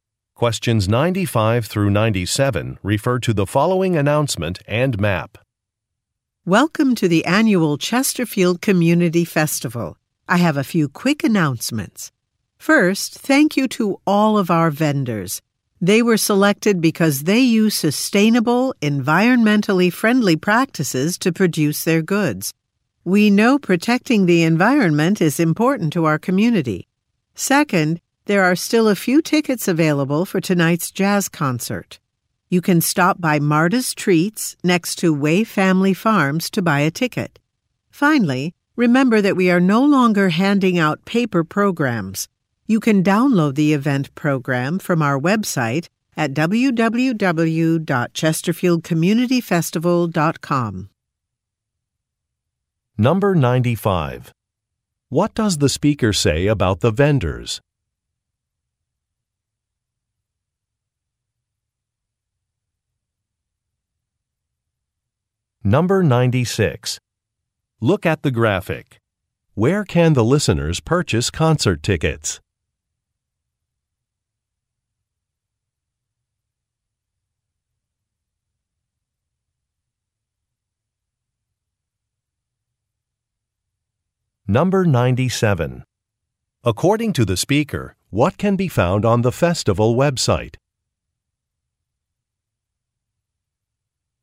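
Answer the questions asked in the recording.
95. They use environmentally friendly practices
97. The event program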